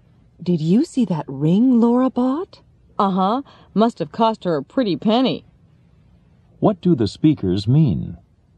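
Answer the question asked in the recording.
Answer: The ring was very expensive.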